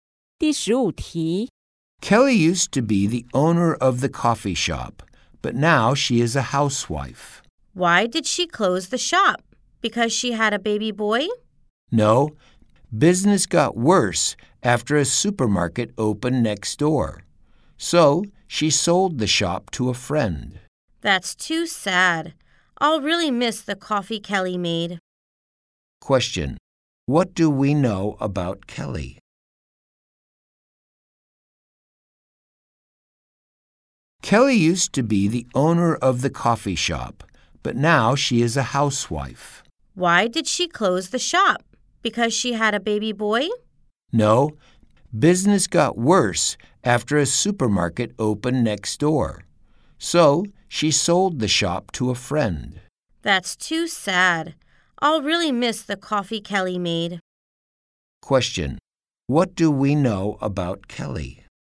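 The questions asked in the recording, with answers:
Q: What do we know about Kelly?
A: She sold her coffee shop to a friend because business got worse, and now she's a housewife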